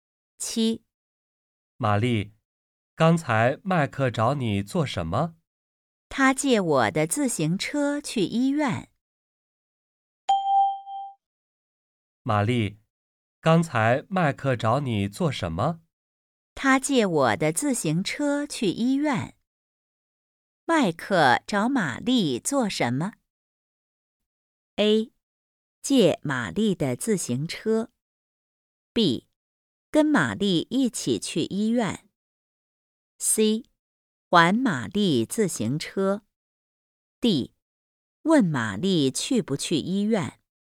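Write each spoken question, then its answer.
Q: 麦克找玛丽做什么?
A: A: 借玛丽的自行车。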